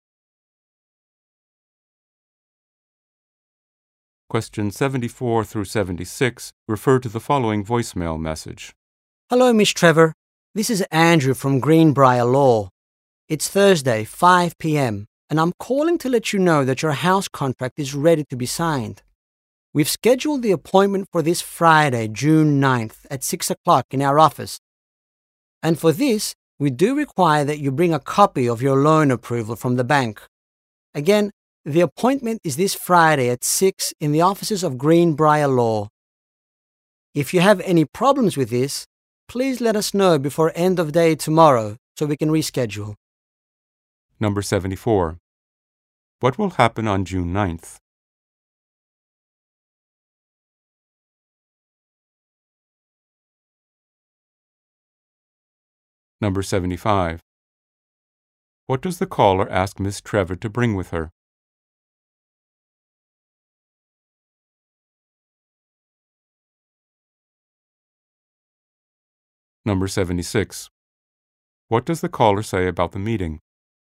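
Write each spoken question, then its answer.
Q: What will happen on June 9th?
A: Ms. Trevor will sign her house contract

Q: What does the caller ask Ms. Trevor to bring with her?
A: A copy of her bank loan approval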